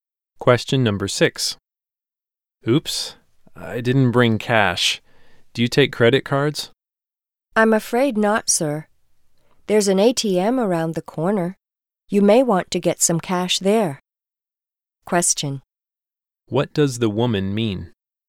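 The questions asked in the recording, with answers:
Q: What does the woman mean?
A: They don't take credit cards; he can get cash at the ATM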